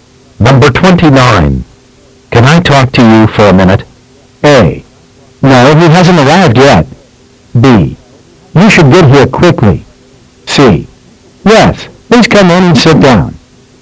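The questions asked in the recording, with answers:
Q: Can I talk to you for a minute?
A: C: Yes, please come in and sit down.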